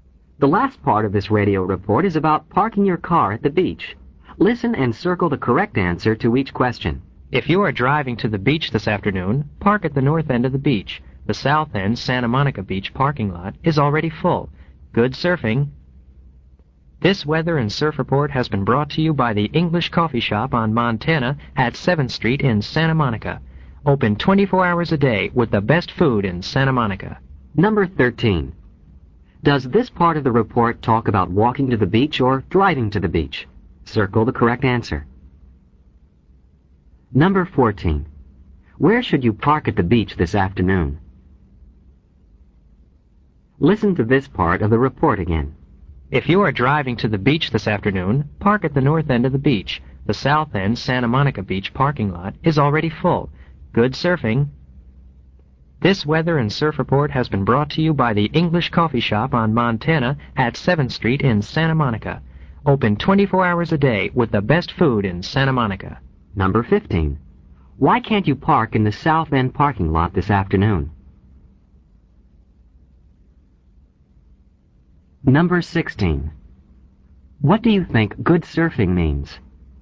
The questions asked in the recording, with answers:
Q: Does this part of the report talk about walking to the beach or driving to the beach?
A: The correct answer is B, driving to the beach.

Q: Where should you park at the beach this afternoon?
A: The answer is B, at the north end.

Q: Why can't you park in the south end parking lot this afternoon?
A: The answer is B, because it is already full.